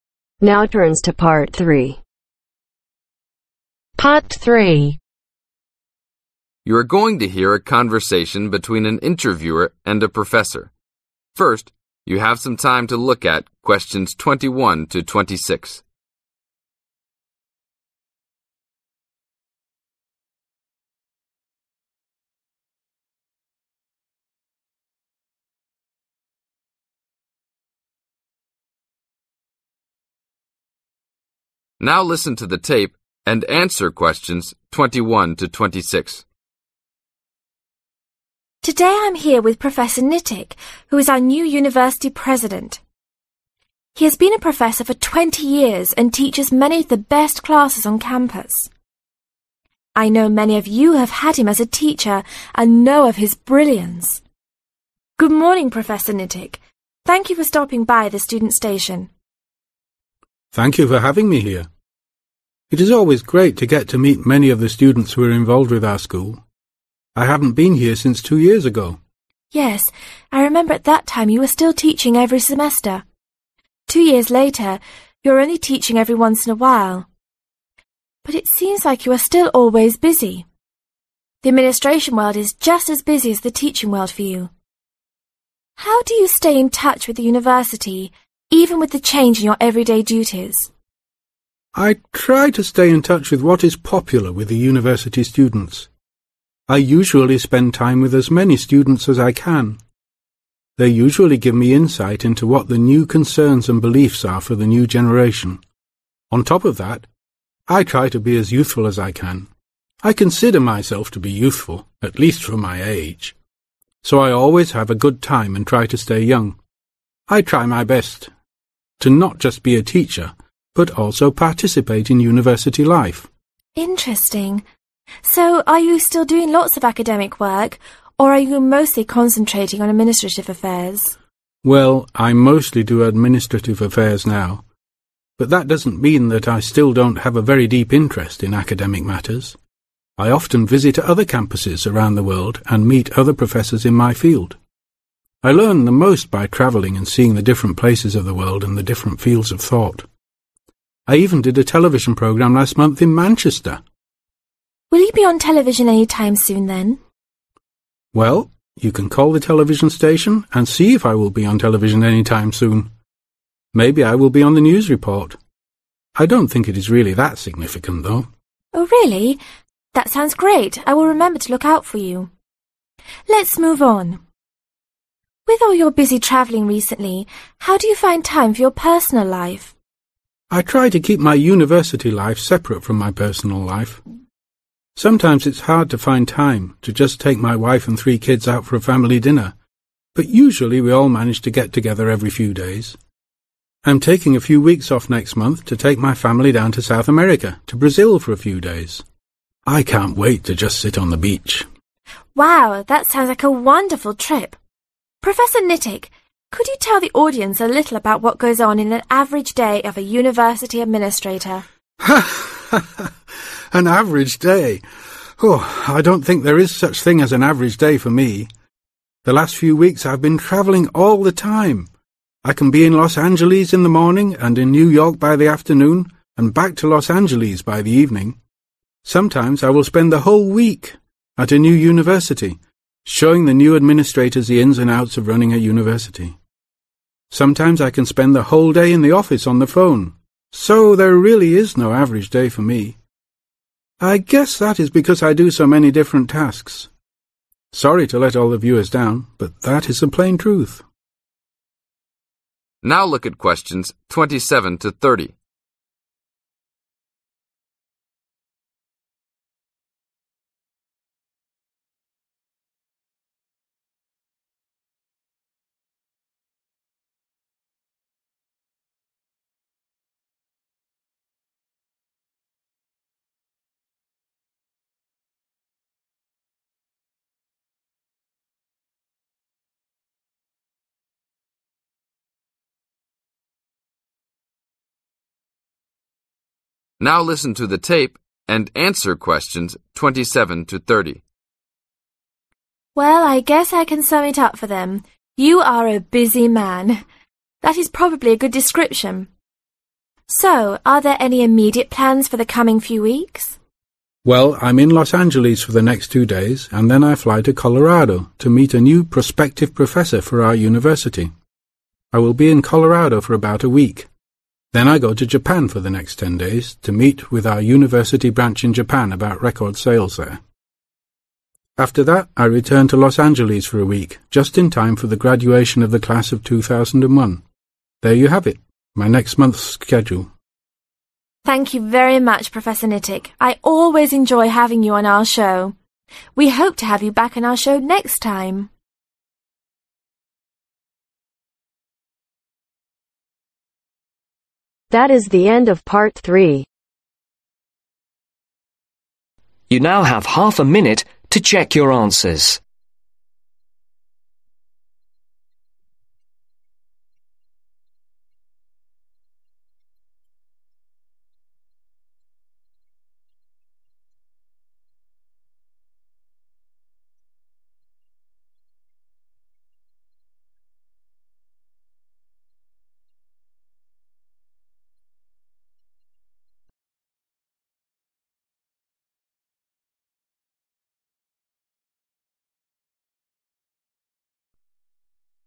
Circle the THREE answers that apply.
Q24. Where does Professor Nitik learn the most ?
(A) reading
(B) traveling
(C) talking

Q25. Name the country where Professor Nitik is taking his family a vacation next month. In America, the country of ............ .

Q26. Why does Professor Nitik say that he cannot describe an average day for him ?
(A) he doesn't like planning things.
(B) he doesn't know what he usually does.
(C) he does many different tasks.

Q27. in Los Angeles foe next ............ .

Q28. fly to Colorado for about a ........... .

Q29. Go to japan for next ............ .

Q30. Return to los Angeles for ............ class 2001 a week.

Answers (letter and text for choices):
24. (B) traveling
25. Brazil
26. (C) he does many different tasks.
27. 2 Days
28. Week
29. 10 Days
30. Graduation